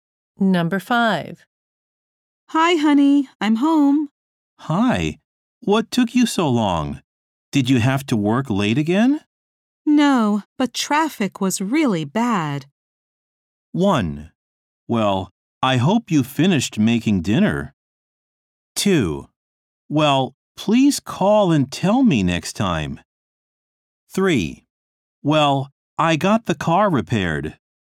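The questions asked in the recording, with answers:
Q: No, but traffic was really bad.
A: 2: Well, please call and tell me next time.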